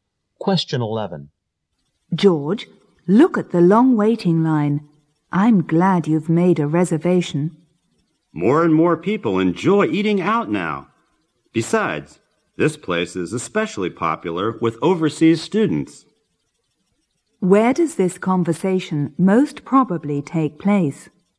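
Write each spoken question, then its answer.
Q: Where does this conversation most probably take place?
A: At a popular restaurant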